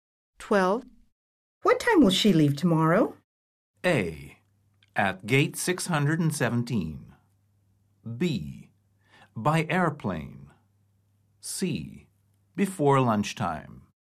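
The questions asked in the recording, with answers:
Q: What time will she leave tomorrow?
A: C: Before lunchtime.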